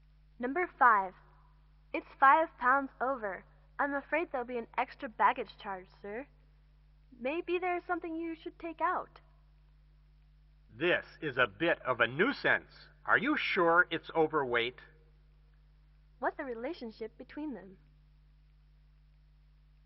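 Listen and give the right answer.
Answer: Airline clerk and passenger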